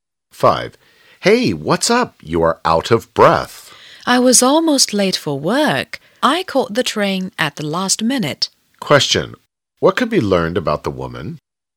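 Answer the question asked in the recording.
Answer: She was almost late for work and caught the train at the last minute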